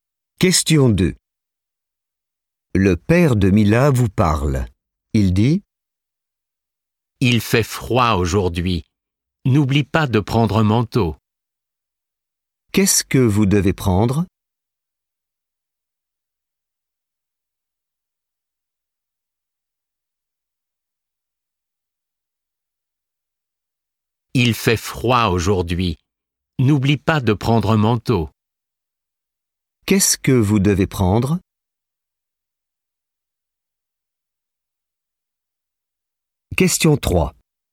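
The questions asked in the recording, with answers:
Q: Qu'est-ce que vous devez prendre?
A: Un manteau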